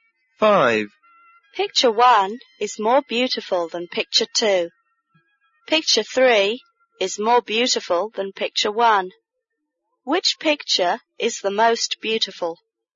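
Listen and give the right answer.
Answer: Picture 3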